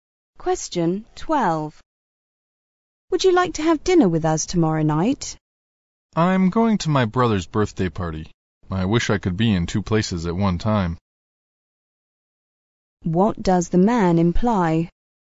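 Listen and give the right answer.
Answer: He can't come to dinner because he's going to his brother's birthday party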